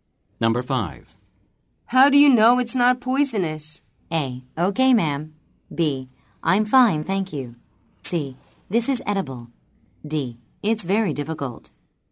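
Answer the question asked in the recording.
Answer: C: This is edible.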